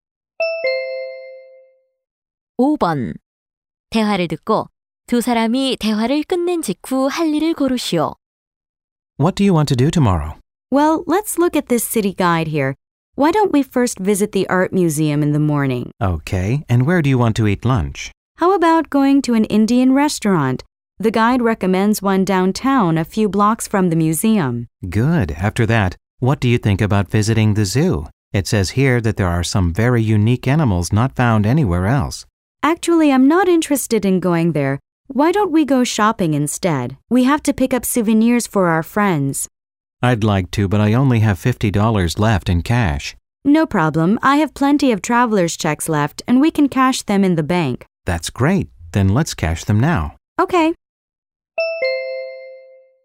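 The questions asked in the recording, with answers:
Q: 대화를 듣고 두 사람이 대화를 끝낸 직후 할 일을 고르시오.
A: 은행에서 여행자 수표 현금으로 바꾸기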